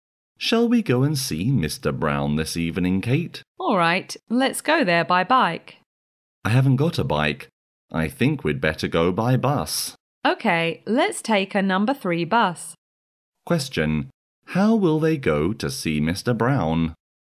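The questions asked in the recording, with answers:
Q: how will they go to see Mr. Brown?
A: By bus (a number 3 bus)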